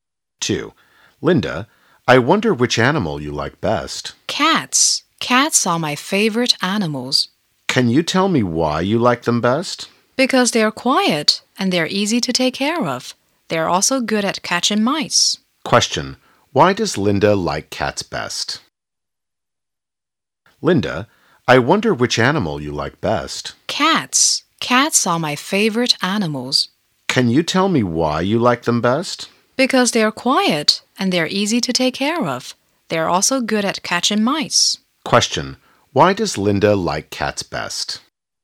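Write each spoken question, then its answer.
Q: Why does Linda like cats best?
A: They are quiet, easy to take care of and good at catching mice.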